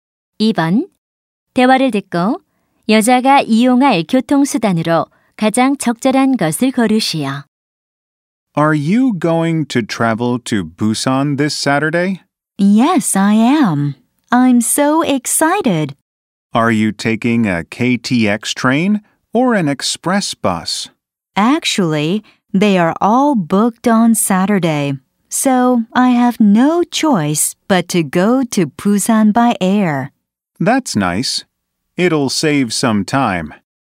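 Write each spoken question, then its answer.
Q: 대화를 듣고 여자가 이용할 교통수단으로 가장 적절한 것을 고르시오.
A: 비행기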